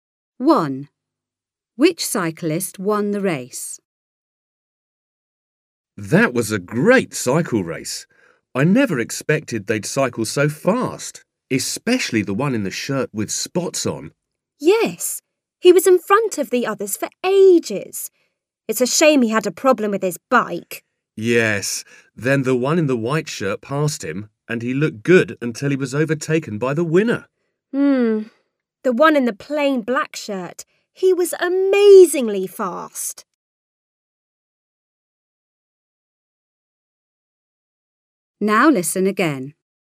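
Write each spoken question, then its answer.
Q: Which cyclist won the race?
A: The one in the plain black shirt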